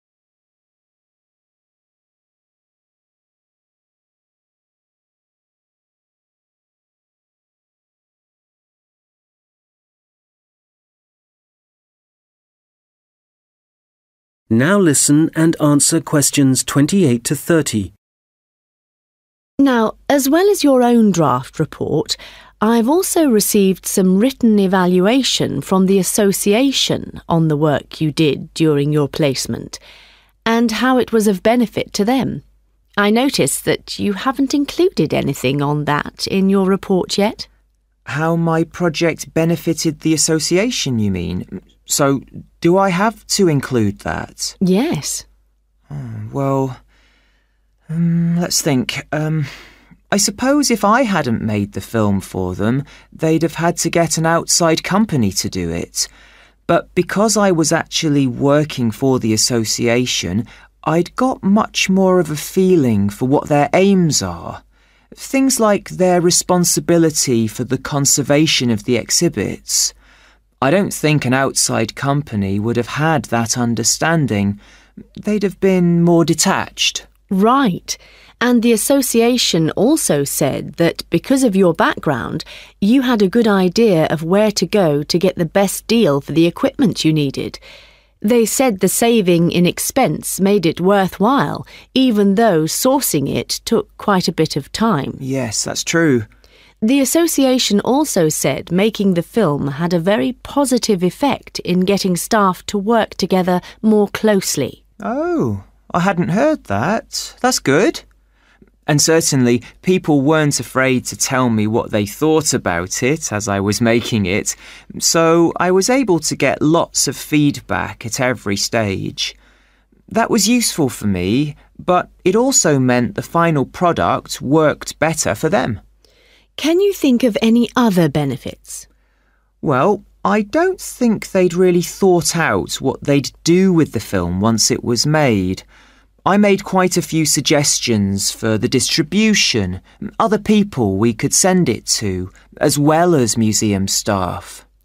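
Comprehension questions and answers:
Questions 28-30: Complete the notes below. Write ONE WORD ONLY for each answer.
his understanding of the Association's 28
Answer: aims

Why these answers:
But because I was actually working for the Association, I'd got much more of a feeling for (= understanding of) what their aims are. [Nhưng vì tôi đang thực sự làm việc cho Hiệp hội nên tôi có nhiều cảm giác hơn về mục tiêu của họ là gì]

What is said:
Tutor: Now as well as your own draft report, I've also received some written evaluation from the Association on the work you did during your placement, and how it was of benefit to them. I noticed that you haven't included anything on that in your report yet.
Stewart: How my project benefited the Association, you mean? So do I have to include that?
Tutor: Yes.
Stewart: Well, let's think ... I suppose if I hadn't made the film for them, they'd have had to get an outside company to do it. 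(Q28) But because I was actually working for the Association, I'd got much more of a feeling for (= understanding of) what their aims are. I don't think an outside company would have had that understanding, they'd have been more detached.
Tutor: Right. And the Association also said that because of your background, you had a good idea of where to go to get the best deal for the equipment you needed. They said the saving in expense made it worthwhile even though sourcing it took quite a bit of time.
Stewart: Yes, that's true.
Stewart: Oh. I hadn't heard that. That's good. And certainly, people weren't afraid to tell me what they thought about it as I was making it, so (Q30) I was able to get lots of feedback at every stage (= continuous). [Tôi đã nhận được rất nhiều phản hồi ở mọi giai đoạn] That was useful for me but it also meant the final product worked better for them.
Tutor: Can you think of any other benefits?
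Stewart: Well, I don't think they'd really thought out what they'd do with the film once it was made. I made quite a few suggestions for the distribution – other people we could send it to as well as museum staff.
Tutor: Yes, they mentioned that. OK, good, well it sounds like they certainly ...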